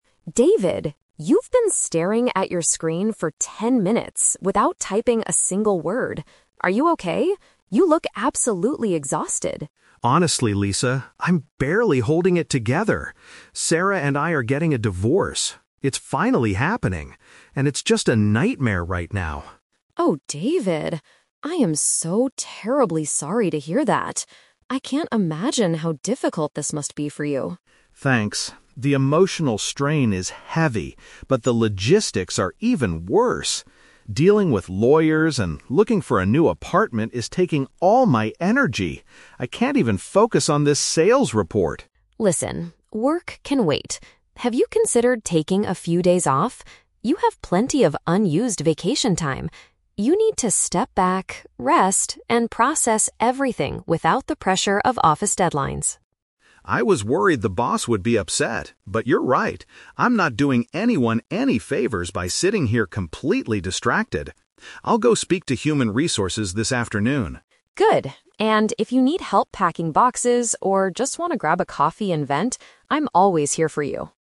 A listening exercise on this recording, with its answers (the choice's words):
Listen to a conversation between two colleagues. Choose the best answer (A, B, or C) for each question.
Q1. Why is David feeling so overwhelmed?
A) His marriage is officially coming to an end.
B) He is struggling to finish a difficult sales report.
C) His boss is angry about his lack of productivity.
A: His marriage is officially coming to an end.

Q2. Besides his sadness, what is causing David a lot of stress?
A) Packing all his personal belongings into boxes by himself.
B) Handling legal matters and trying to find a new place to live.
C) Explaining the situation to his human resources manager.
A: Handling legal matters and trying to find a new place to live.

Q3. What does Lisa strongly advise David to do?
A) Go out for a cup of coffee to talk about his feelings.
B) Ask for an extension to complete his current project.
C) Use his paid leave to get away from work and recover.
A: Use his paid leave to get away from work and recover.

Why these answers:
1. David states that he and his wife are "getting a divorce." Paraphrasing: getting a divorce = marriage is officially coming to an end. Trap: Option B is a trap because the "sales report" is mentioned, but he can't focus on it because of his divorce; the report itself isn't the main cause of his stress. Option C is a distractor; he was "worried the boss would be upset," but the boss isn't actually angry yet.
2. David explains that "dealing with lawyers and looking for a new apartment" is taking all his energy. Paraphrasing: dealing with lawyers = handling legal matters; looking for a new apartment = trying to find a new place to live. Trap: Option A is a trap. "Packing boxes" is mentioned at the very end when Lisa offers to help him, but it is not what David says is currently stressing him out. Option C is incorrect; he plans to speak to HR later, but it's not the cause of his stress.
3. Lisa asks, "Have you considered taking a few days off?" and mentions he has "unused vacation time." She tells him to "step back, rest, and process everything." Paraphrasing: taking days off / unused vacation time = use his paid leave; rest = recover. Trap: Option A is a trap. Lisa offers to grab a coffee and let him vent, but her main advice/recommendation for his situation is to take time off. Option B is not mentioned; she says "work can wait," not to ask for an extension.

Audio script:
Lisa: David, you've been staring at your screen for ten minutes without typing a single word. Are you okay? You look absolutely exhausted.
David: Honestly, Lisa, I'm barely holding it together. Sarah and I are getting a divorce. It's finally happening, and it's just a nightmare right now.
Lisa: Oh, David. I am so terribly sorry to hear that. I can't imagine how difficult this must be for you.
David: Thanks. The emotional strain is heavy, but the logistics are even worse. Dealing with lawyers and looking for a new apartment is taking all my energy. I can't even focus on this sales report.
Lisa: Listen, work can wait. Have you considered taking a few days off? You have plenty of unused vacation time. You need to step back, rest, and process everything without the pressure of office deadlines.
David: I was worried the boss would be upset, but you're right. I'm not doing anyone any favors by sitting here completely distracted. I'll go speak to human resources this afternoon.
Lisa: Good. And if you need help packing boxes or just want to grab a coffee and vent, I'm always here for you.